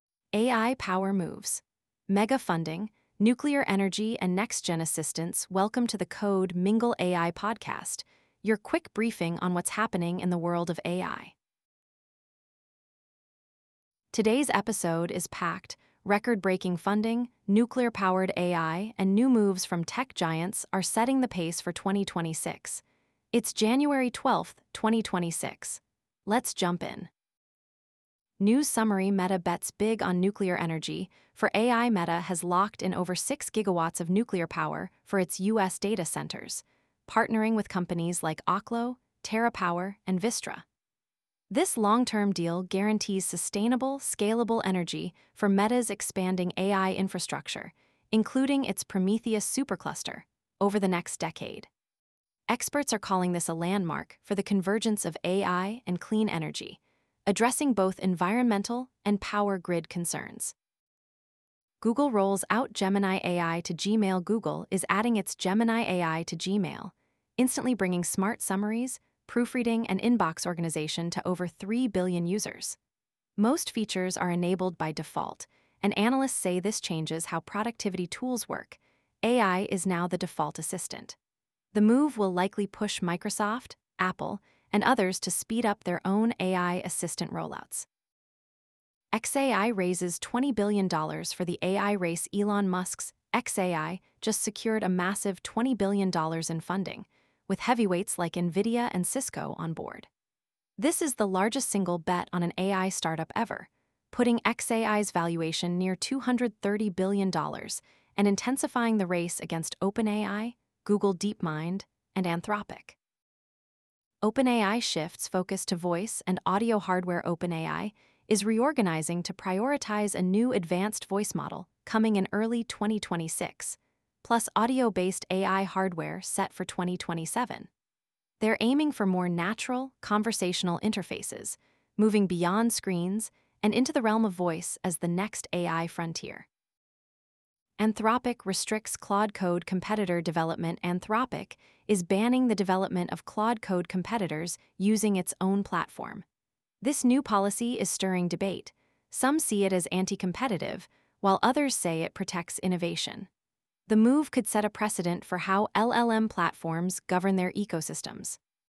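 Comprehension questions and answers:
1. What is the primary reason Meta secured over 6 GW of nuclear energy for its U.S. data centers?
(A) To reduce costs of traditional energy sources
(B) To ensure sustainable, scalable energy for expanding AI infrastructure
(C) To power its social media operations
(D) To support cryptocurrency mining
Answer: To ensure sustainable, scalable energy for expanding AI infrastructure

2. Which company recently rolled out Gemini AI features to over 3 billion Gmail users?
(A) Microsoft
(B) Apple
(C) Google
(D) Meta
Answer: Google

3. How much funding did Elon Musk's xAI secure in its latest round?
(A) $2 billion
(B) $10 billion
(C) $20 billion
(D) $50 billion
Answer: $20 billion

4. What is a key impact of Google's Gemini AI integration into Gmail?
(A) It will reduce the number of Gmail users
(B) It will force competitors to accelerate their own AI assistant deployments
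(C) It will eliminate the need for email altogether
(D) It will restrict access to productivity tools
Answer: It will force competitors to accelerate their own AI assistant deployments

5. Which of the following companies participated in xAI's $20 billion funding round?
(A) Amazon and IBM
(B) Nvidia and Cisco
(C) Apple and Meta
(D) Google and Oracle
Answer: Nvidia and Cisco

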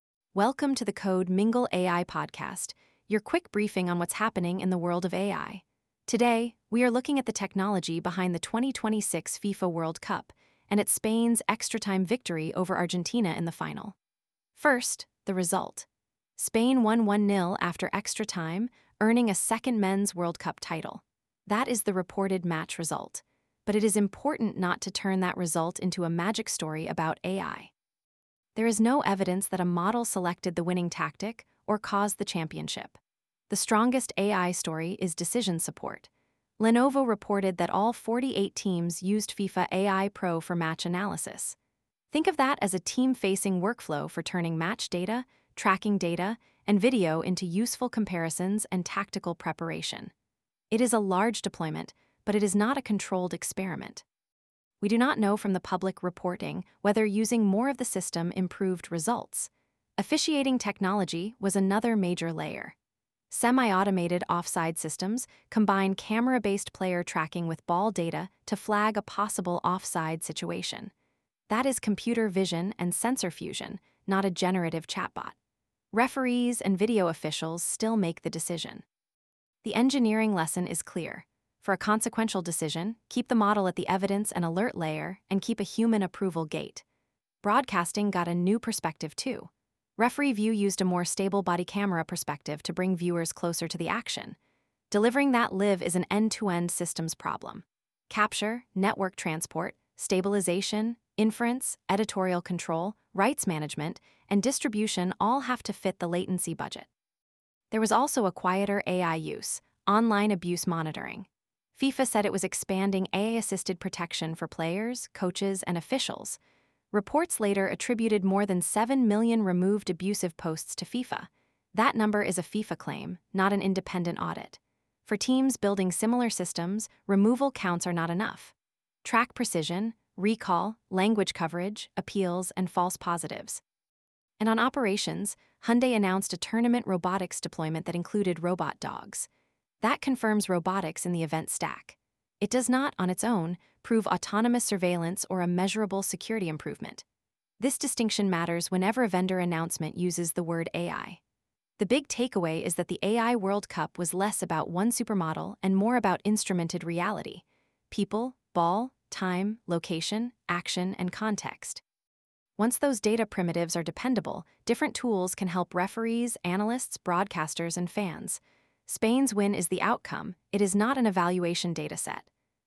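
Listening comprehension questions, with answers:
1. What was the confirmed result of the 2026 FIFA World Cup final described in this issue?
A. Argentina beat Spain 2–1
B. Spain beat Argentina 1–0 after extra time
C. Spain beat Argentina on penalties after a 0–0 draw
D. The final was abandoned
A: Spain beat Argentina 1–0 after extra time

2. What is the best description of semi-automated offside technology?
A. A chatbot that announces the referee's decision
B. A fully autonomous referee that cannot be overruled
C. Camera, ball, and tracking data used to support a human officiating decision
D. A system that predicts the match winner before kickoff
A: Camera, ball, and tracking data used to support a human officiating decision

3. What did Lenovo report about FIFA AI Pro at the 2026 tournament?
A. It was available to all 48 teams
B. It was used only by broadcasters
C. It replaced every national-team coach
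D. It was a public betting chatbot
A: It was available to all 48 teams

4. Why does the issue describe Referee View as an infrastructure and broadcast problem?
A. It requires only a text prompt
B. It must capture, transport, process, stabilize, and distribute live video within a useful latency budget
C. It works only after the tournament ends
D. It removes the need for cameras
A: It must capture, transport, process, stabilize, and distribute live video within a useful latency budget

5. What is the most responsible conclusion about AI and Spain's victory?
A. The result proves AI selected Spain's winning tactics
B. The result proves all AI predictions are accurate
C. AI had no role anywhere in the tournament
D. AI-supported tools were deployed, but the final does not prove they caused the title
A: AI-supported tools were deployed, but the final does not prove they caused the title

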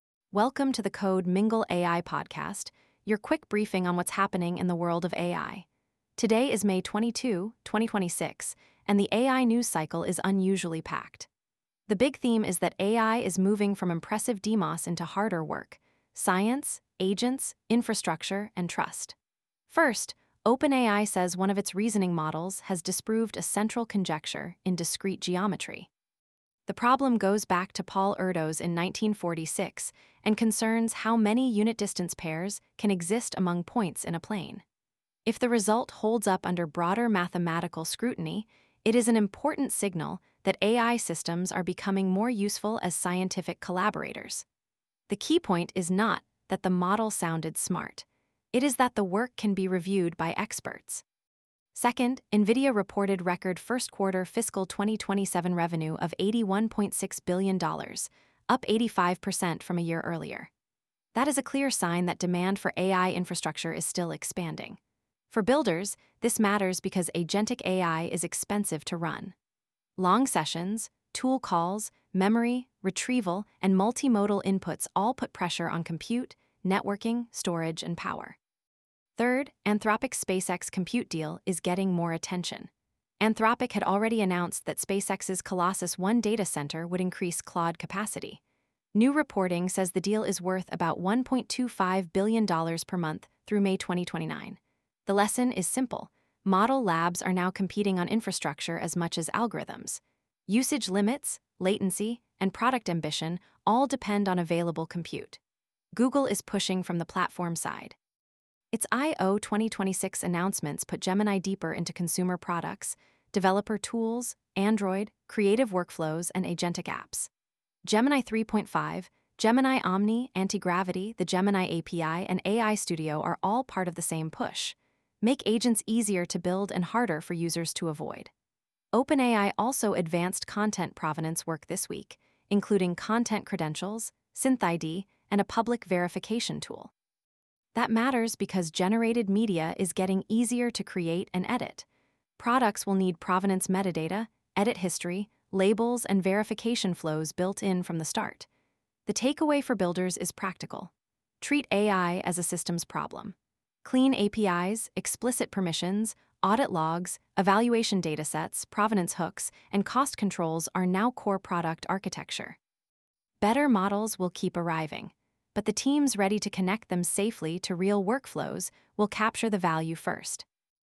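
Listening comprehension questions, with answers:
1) What is the main significance of OpenAI's May 20 discrete-geometry announcement?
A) It shows AI models can only solve problems already in their training data.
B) It claims a reasoning model produced a proof disproving a long-standing conjecture, pointing toward AI as a scientific collaborator.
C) It announces a new consumer image editor.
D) It replaces the need for mathematical verification.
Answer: It claims a reasoning model produced a proof disproving a long-standing conjecture, pointing toward AI as a scientific collaborator.

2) Why does NVIDIA's $81.6 billion quarterly revenue matter for AI product teams?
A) It proves inference is now free.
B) It shows AI infrastructure demand remains high and will influence product cost, capacity, and architecture decisions.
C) It means software teams no longer need model routing.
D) It only affects gaming hardware.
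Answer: It shows AI infrastructure demand remains high and will influence product cost, capacity, and architecture decisions.

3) What is the deeper lesson from Anthropic's SpaceX compute deal?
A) Frontier model companies can ignore data-center capacity.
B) Compute access has become a strategic moat and risk for model labs.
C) Claude no longer needs GPUs.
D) Usage limits are unrelated to infrastructure.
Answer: Compute access has become a strategic moat and risk for model labs.

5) Why is content provenance becoming part of AI product infrastructure?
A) Generated media is becoming easier to create and edit, so products need ways to preserve origin, edits, labels, and verification metadata.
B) Watermarking eliminates every misinformation risk.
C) C2PA metadata is only useful for internal logs.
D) Provenance matters only after a product has scaled.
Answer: Generated media is becoming easier to create and edit, so products need ways to preserve origin, edits, labels, and verification metadata.

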